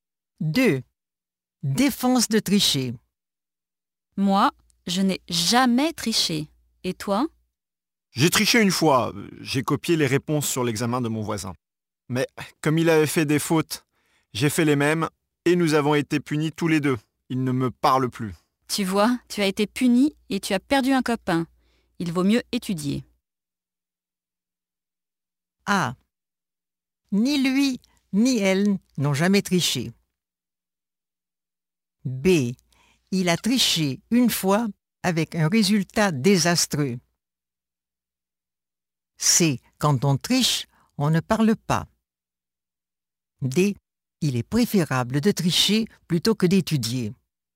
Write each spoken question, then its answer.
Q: Défense de tricher.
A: B. Il a triché une fois avec un résultat désastreux.